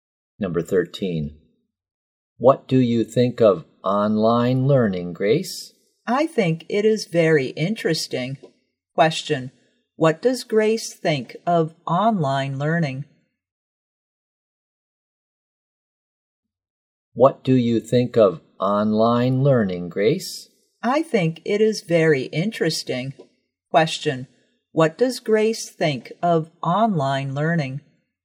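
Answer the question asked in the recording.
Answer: Very interesting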